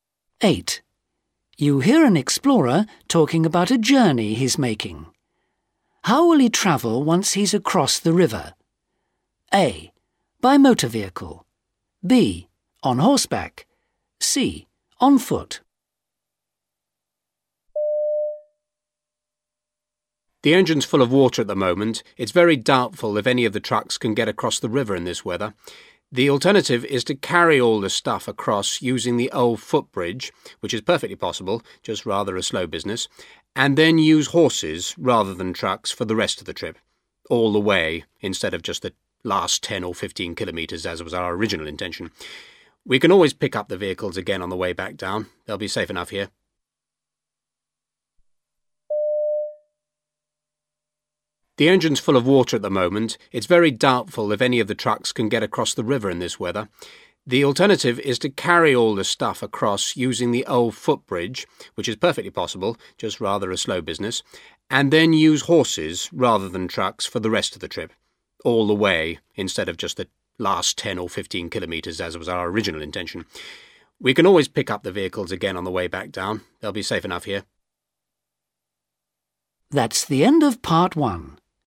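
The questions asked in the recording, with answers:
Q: How will he travel once he's across the river?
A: B: On horseback.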